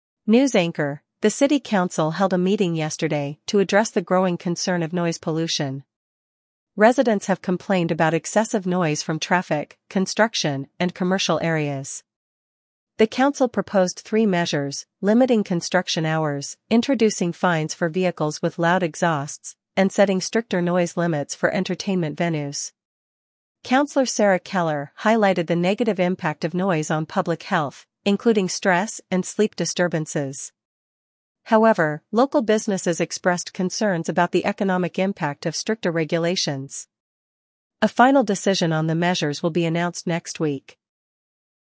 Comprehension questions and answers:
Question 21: What issue did the city council discuss?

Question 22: Name one proposed measure to reduce noise pollution.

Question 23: Who raised concerns about the negative health impacts?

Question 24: What worries did local businesses express?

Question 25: When will the final decision be announced?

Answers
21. Noise pollution
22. Limiting construction hours
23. Sarah Keller
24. Economic impact
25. Next week

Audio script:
News Anchor: The city council held a meeting yesterday to address the growing concern of noise pollution. Residents have complained about excessive noise from traffic, construction, and commercial areas.
The council proposed three measures: limiting construction hours, introducing fines for vehicles with loud exhausts, and setting stricter noise limits for entertainment venues.
Councillor Sarah Keller highlighted the negative impact of noise on public health, including stress and sleep disturbances. However, local businesses expressed concerns about the economic impact of stricter regulations.
A final decision on the measures will be announced next week.